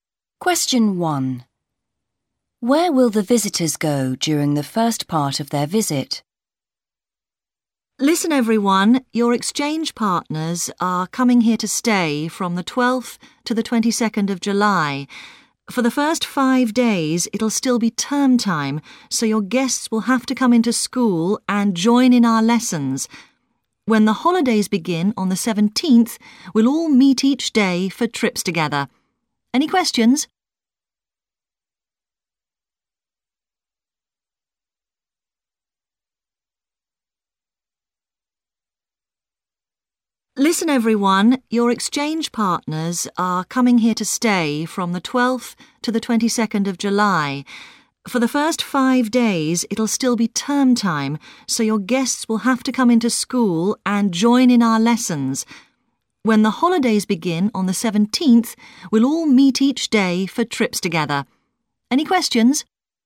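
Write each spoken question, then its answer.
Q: Where will the visitors go during the first part of their visit?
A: To school, to join in lessons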